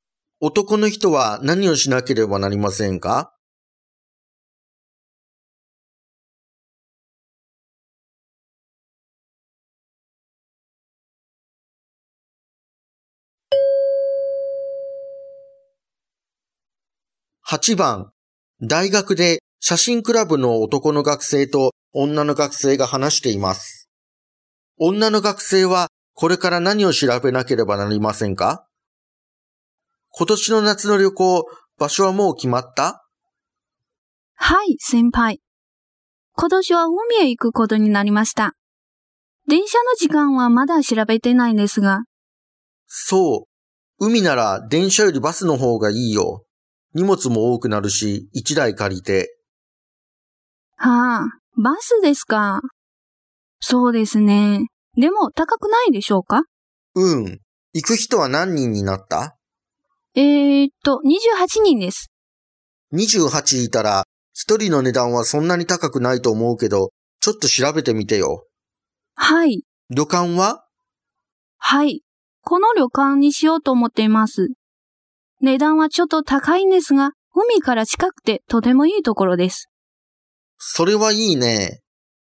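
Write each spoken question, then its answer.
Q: 女の学生はこれから何を調べなければなりませんか?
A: バスを借りる値段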